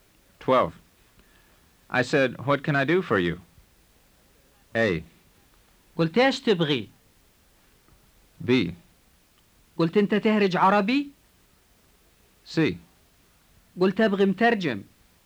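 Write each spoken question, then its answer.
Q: I said, what can I do for you?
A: A: قلت ايش تبغي؟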